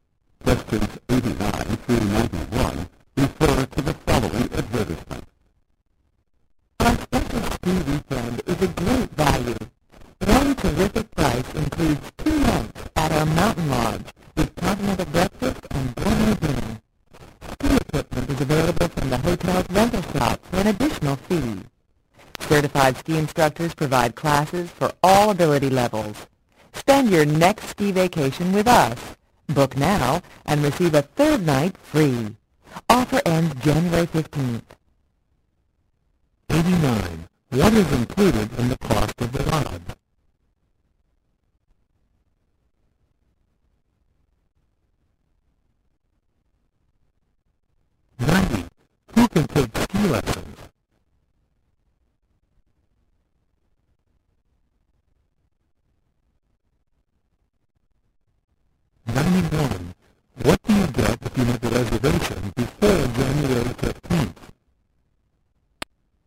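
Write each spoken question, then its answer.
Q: Who can take ski lessons?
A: People of all ability levels

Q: What do you get if you make a reservation before January 15th?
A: A third night free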